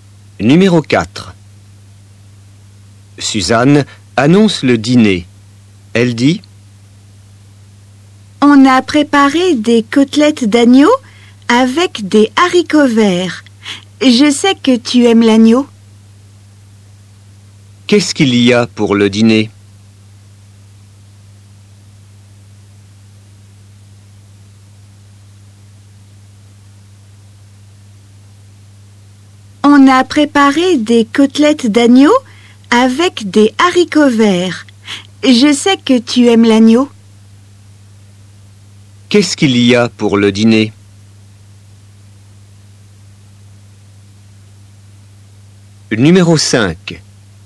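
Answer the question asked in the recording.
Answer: des côtelettes d'agneau avec des haricots verts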